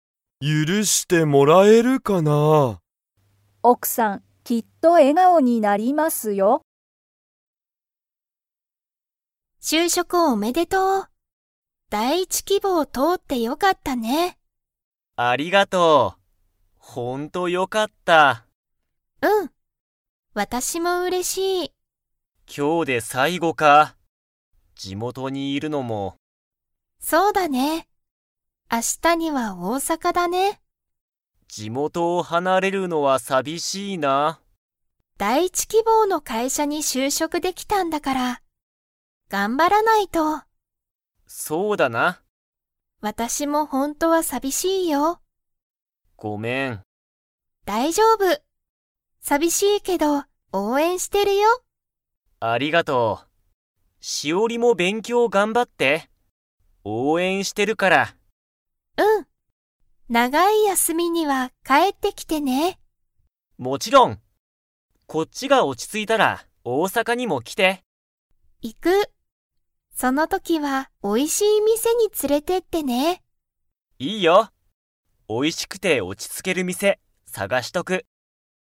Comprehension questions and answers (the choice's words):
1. けんじは、明日あしたどこにいますか?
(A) 地元じもと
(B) 東京とうきょう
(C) 大阪おおさか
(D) 大学だいがく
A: 大阪おおさか

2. けんじがいなくなって、しおりは 。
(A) 寂さびしい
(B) 寂さびしくない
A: 寂さびしい

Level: Level 4